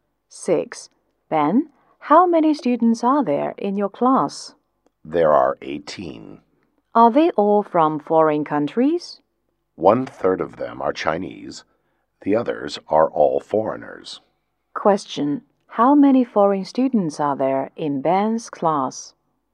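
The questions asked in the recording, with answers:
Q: How many foreign students are there in Ben's class?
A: 12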